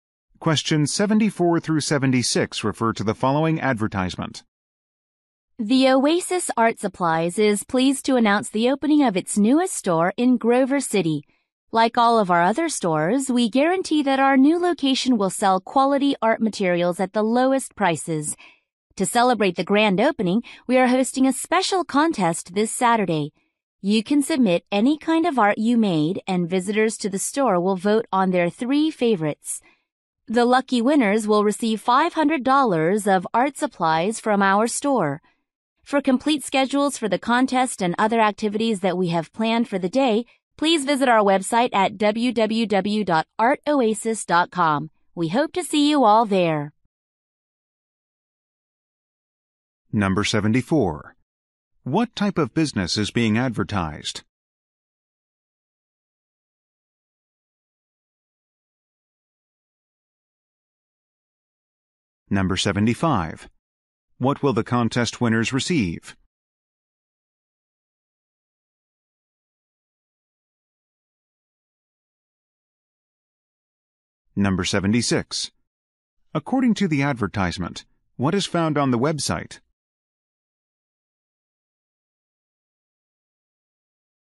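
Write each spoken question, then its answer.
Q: What type of business is being advertised?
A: An art supply store

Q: What will the contest winners receive?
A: $500 of art supplies

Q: According to the advertisement, what is found on the website?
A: Complete schedules for the contest and other activities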